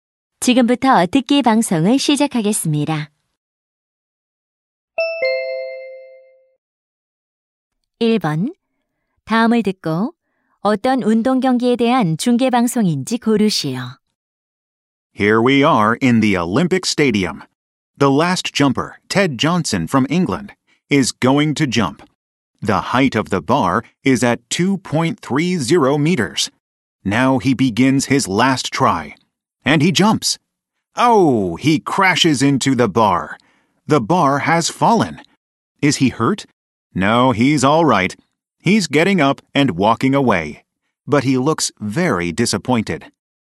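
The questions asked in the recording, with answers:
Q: 다음을 듣고 어떤 운동 경기에 대한 중계 방송인지 고르시오.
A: 높이뛰기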